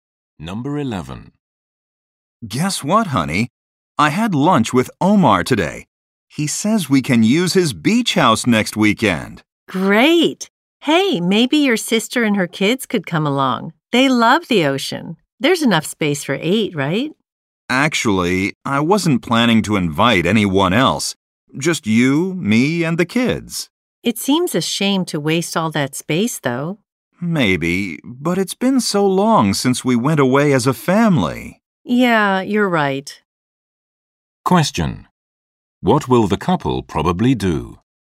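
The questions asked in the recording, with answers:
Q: What will the couple probably do?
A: Go to the beach house with just their own family.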